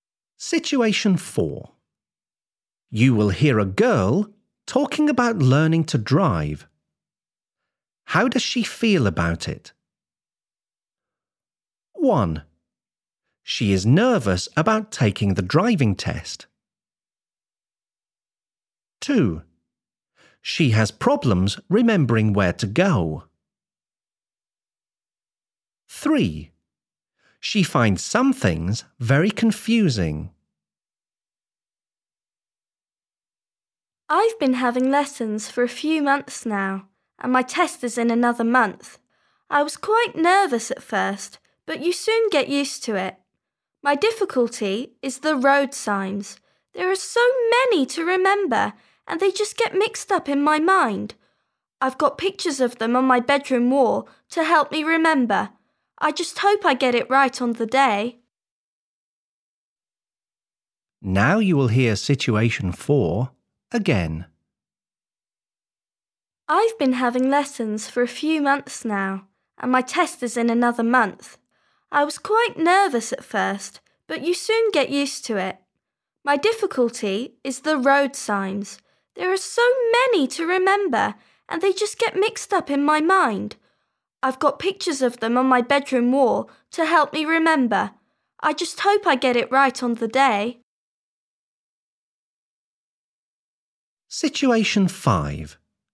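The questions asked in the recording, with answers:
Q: How does she feel about it?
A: 3: She finds some things very confusing.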